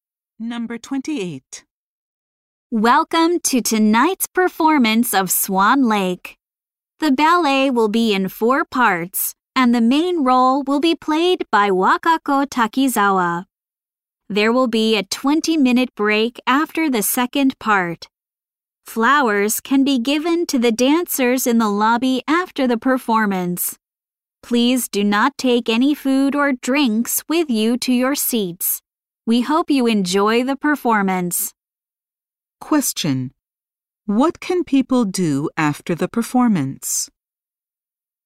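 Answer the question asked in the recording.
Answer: Give flowers to the dancers in the lobby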